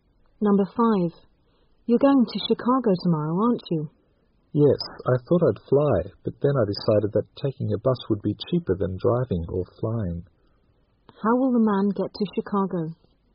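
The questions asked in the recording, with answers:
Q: How will the man get to Chicago?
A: By bus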